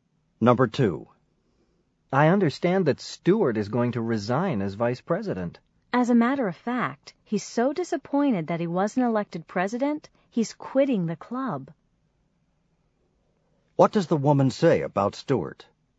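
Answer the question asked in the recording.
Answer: He is quitting the club because he wasn't elected president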